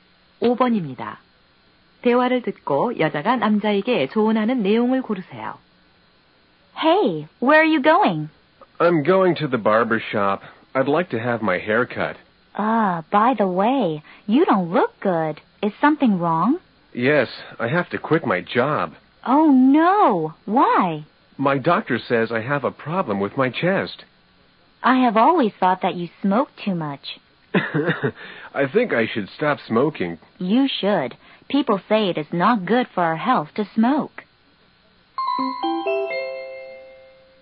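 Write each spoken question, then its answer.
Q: 대화를 듣고 여자가 남자에게 조언하는 내용을 고르세요.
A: 담배를 끊어라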